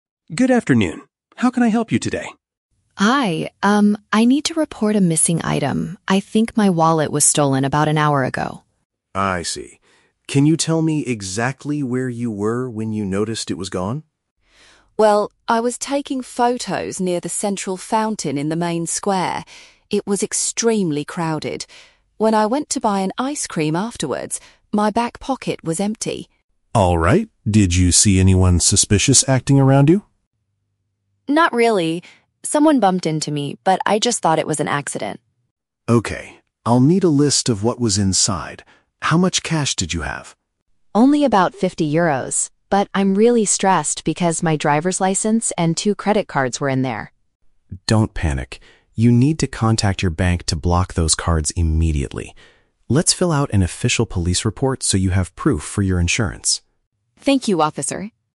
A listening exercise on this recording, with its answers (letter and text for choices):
Listen to the conversation between a tourist and a police officer. Choose the correct answer (A, B, or C) for each question.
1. Where does the tourist believe the theft happened?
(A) Inside a local ice cream shop.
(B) In a crowded public space.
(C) On a busy public train.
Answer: (B) In a crowded public space.

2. What is the tourist most worried about losing?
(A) A large amount of foreign money.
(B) Her expensive digital camera.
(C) Her personal identification and bank cards.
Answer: (C) Her personal identification and bank cards.

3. What does the police officer advise the tourist to do FIRST?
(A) Call the bank to cancel her cards.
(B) Return to the square to search for it.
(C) Contact her insurance company for money.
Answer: (A) Call the bank to cancel her cards.

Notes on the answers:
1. The Key: The tourist mentions she was near the "central fountain in the main square" and says "It was extremely crowded." A main square is a public space. The Trap (A): The tourist mentions she went to "buy an ice cream", but that is when she realized her pocket was empty. The theft likely happened earlier at the fountain. Plausible but not mentioned (C): Pickpocketing often happens on public trains, but a train is not mentioned in this conversation.
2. The Key: The tourist says she is stressed because her "driver's license" (personal identification) and "credit cards" (bank cards) were inside the wallet. The Trap (A): The tourist mentions having "fifty euros" (foreign money), but she starts by saying "Only about...", meaning it was not a large amount and not her main worry. The Trap (B): She was "taking photos" earlier, but she did not lose her camera.
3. The Key: The officer tells her, "You need to contact your bank to block those cards immediately." To block a card means to cancel it so thieves cannot use it. The Trap (C): The officer mentions filling out a report to have "proof for your insurance," but he does not tell her to call the insurance company immediately. The first action is calling the bank. Plausible but not mentioned (B): Going back to look for the wallet is a logical thing to do, but the officer does not suggest this.

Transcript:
Officer: Good afternoon. How can I help you today?
Tourist: Hi, um, I need to report a missing item. I think my wallet was stolen about an hour ago.
Officer: I see. Can you tell me exactly where you were when you noticed it was gone?
Tourist: Well, I was taking photos near the central fountain in the main square. It was extremely crowded. When I went to buy an ice cream afterwards, my back pocket was empty.
Officer: Alright. Did you see anyone suspicious acting around you?
Tourist: Not really. Someone bumped into me, but I just thought it was an accident.
Officer: Okay. I'll need a list of what was inside. How much cash did you have?
Tourist: Only about fifty euros. But I'm really stressed because my driver's license and two credit cards were in there.
Officer: Don't panic. You need to contact your bank to block those cards immediately. Let's fill out an official police report so you have proof for your insurance.
Tourist: Thank you, officer.